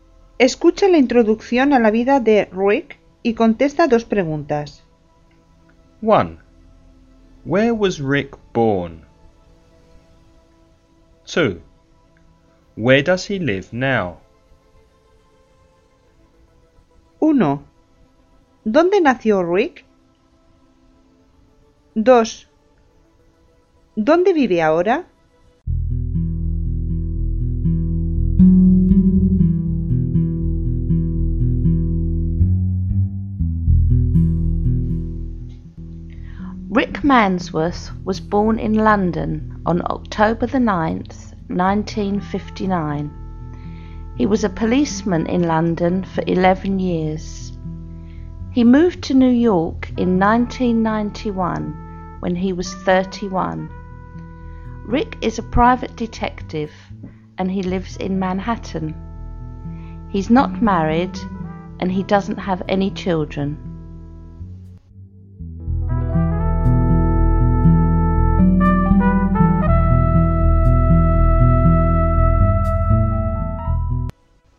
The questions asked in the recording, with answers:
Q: Where was Rick born?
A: He was born in London.

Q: Where does he live now?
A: He lives in Manhattan, New York.